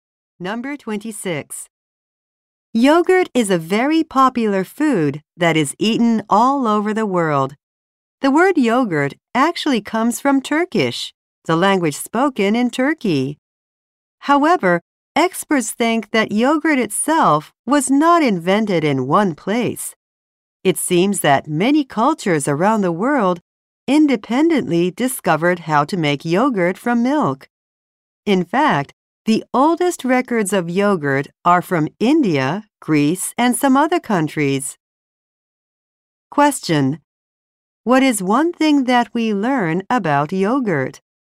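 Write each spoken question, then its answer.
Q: What is one thing that we learn about yogurt?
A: It was discovered independently by many cultures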